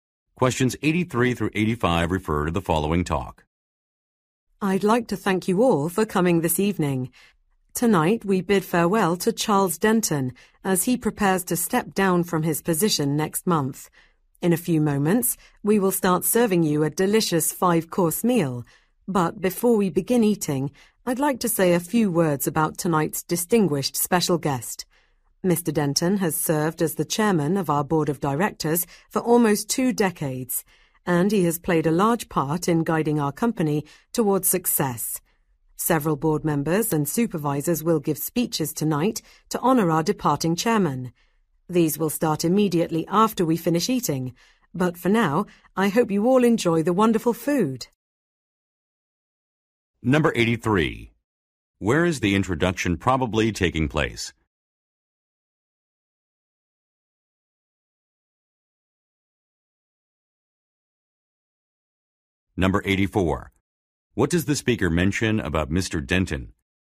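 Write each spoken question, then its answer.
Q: Where is the introduction probably taking place?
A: At a farewell dinner

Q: What does the speaker mention about Mr.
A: He has been board chairman for almost twenty years

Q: What will the listeners do after they finish their meal?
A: Listen to speeches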